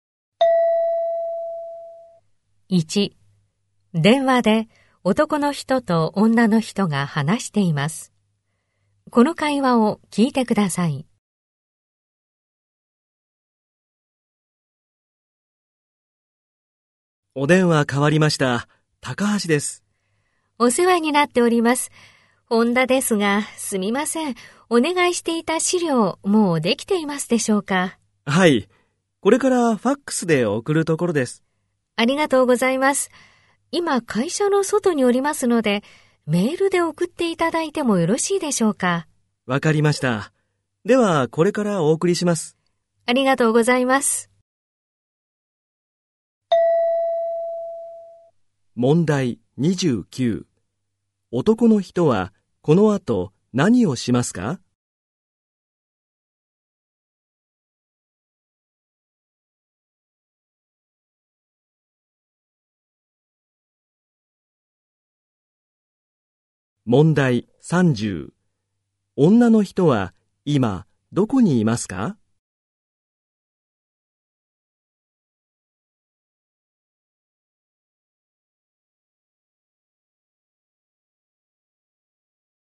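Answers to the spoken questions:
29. 資料をメールで送る
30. 会社の外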